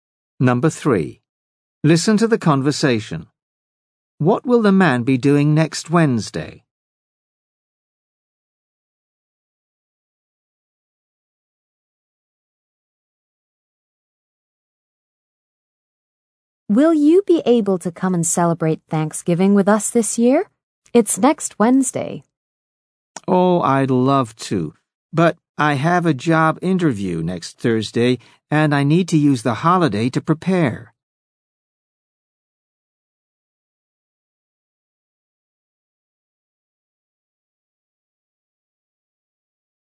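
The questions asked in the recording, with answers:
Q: What will the man be doing next Wednesday?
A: Preparing for a job interview.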